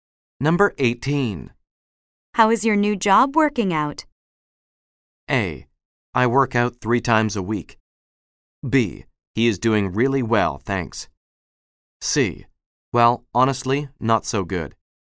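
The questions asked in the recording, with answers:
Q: How is your new job working out?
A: C: Well, honestly, not so good.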